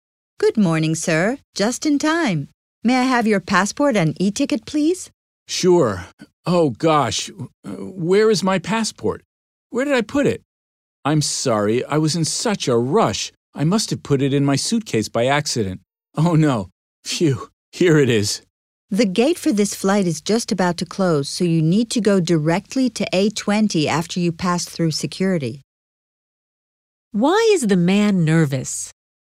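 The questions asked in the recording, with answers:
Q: Why is the man nervous?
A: He can't find his passport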